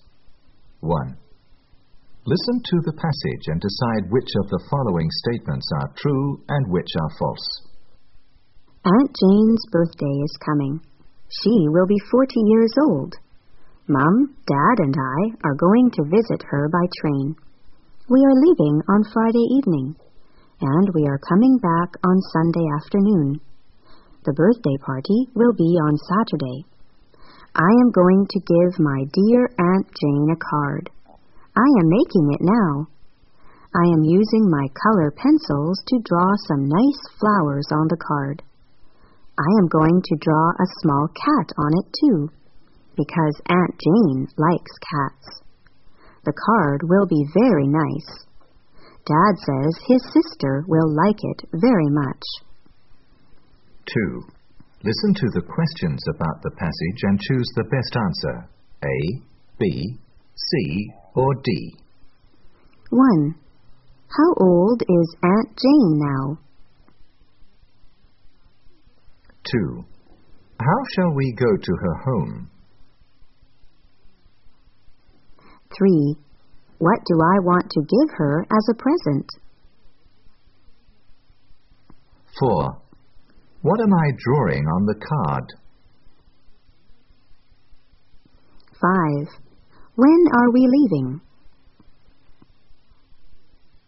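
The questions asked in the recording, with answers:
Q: How shall we go to her home?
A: By train

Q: What do I want to give her as a present?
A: A card

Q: What am I drawing on the card?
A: Some nice flowers and a small cat

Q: When are we leaving?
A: On Friday evening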